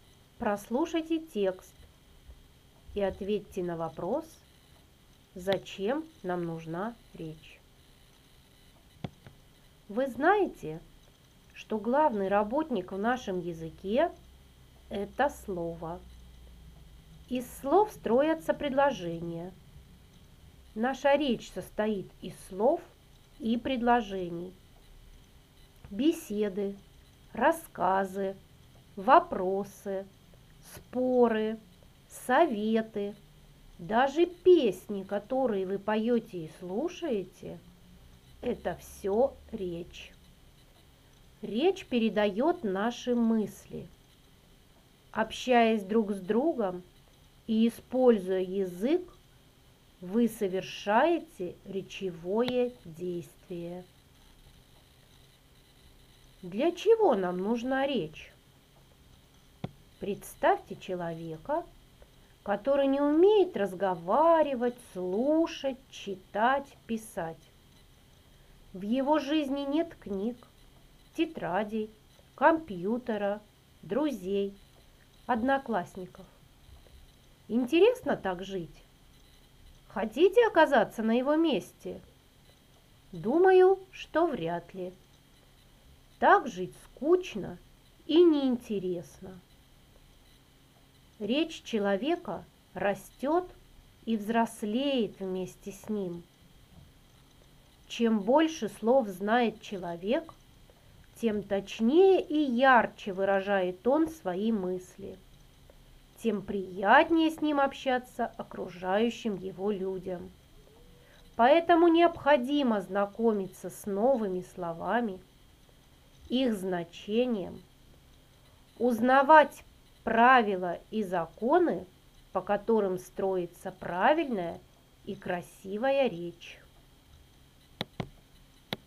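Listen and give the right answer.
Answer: Чтобы передавать свои мысли и общаться с другими людьми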